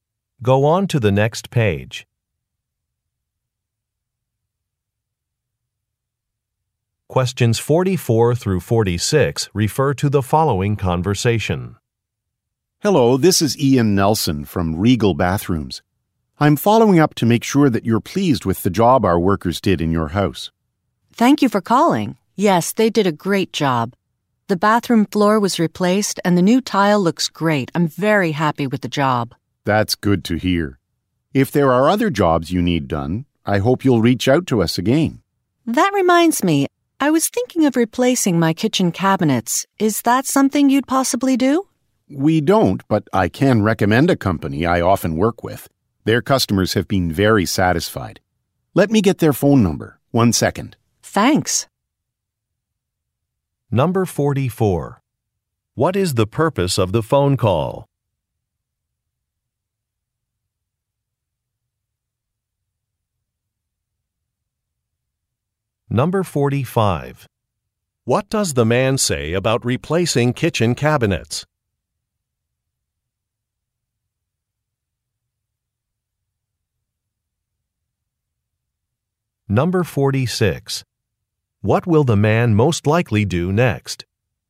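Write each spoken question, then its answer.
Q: What is the purpose of the phone call?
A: To check customer satisfaction with a completed job

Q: What does the man say about replacing kitchen cabinets?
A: His company doesn't do it, but he can recommend another company

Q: What will the man most likely do next?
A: Get another company's phone number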